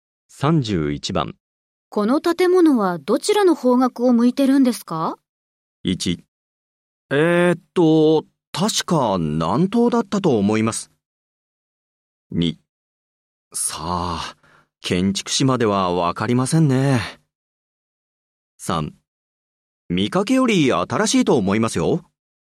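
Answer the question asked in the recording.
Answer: 1: 確か南東だったと思います。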